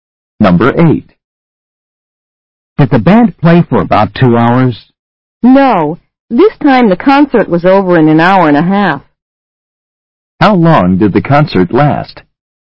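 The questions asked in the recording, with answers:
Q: How long did the concert last?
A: An hour and a half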